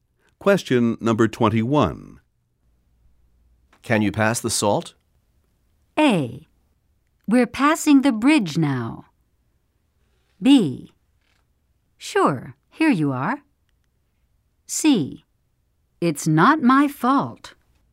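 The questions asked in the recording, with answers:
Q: Can you pass the salt?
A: B: Sure, here you are.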